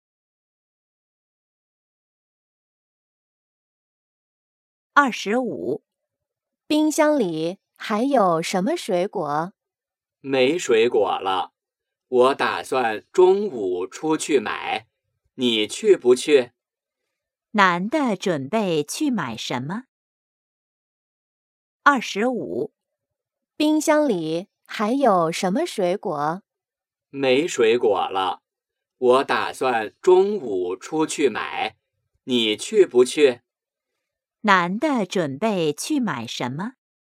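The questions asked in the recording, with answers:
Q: 男的准备去买什么?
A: 水果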